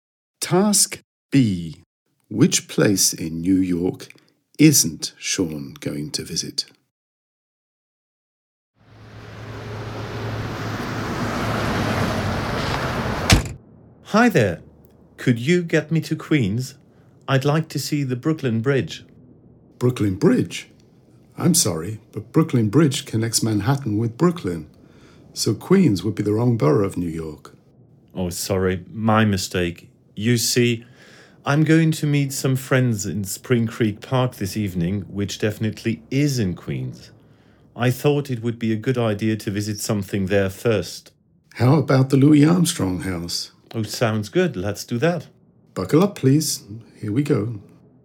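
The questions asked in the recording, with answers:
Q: Which place in New York isn't Sean going to visit?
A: Brooklyn Bridge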